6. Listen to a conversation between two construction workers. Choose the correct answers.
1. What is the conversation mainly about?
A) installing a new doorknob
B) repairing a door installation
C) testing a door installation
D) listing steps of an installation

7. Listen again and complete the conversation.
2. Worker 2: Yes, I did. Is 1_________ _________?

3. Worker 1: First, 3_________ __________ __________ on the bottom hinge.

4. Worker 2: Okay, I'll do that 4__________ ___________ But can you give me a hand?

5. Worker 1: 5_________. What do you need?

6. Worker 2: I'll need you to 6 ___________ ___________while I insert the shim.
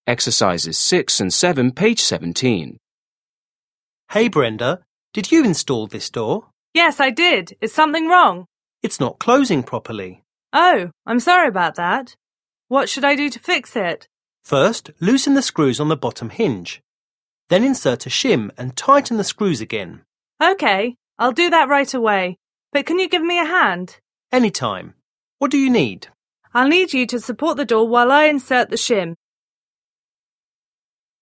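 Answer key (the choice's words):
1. repairing a door installation
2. something wrong
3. loosen the screws
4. right away
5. Anytime
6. support the door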